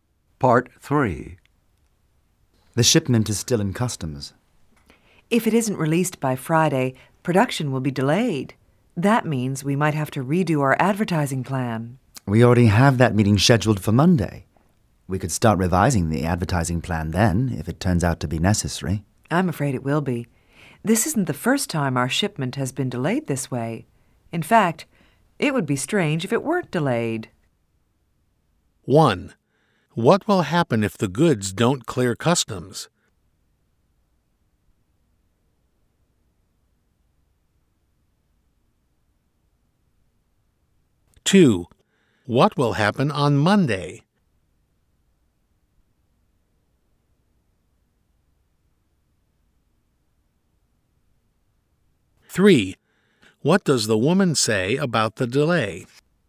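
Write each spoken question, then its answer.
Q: What will happen if the goods don't clear customs?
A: Production will be delayed.

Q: what will happen on Monday?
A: There will be a meeting; they may start revising the advertising plan.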